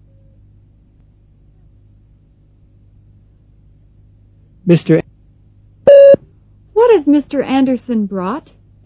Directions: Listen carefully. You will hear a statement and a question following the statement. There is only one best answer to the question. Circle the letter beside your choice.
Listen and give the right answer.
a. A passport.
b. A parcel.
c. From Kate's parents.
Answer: b. A parcel.

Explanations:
Mr. Anderson has brought a parcel from Kate's parents.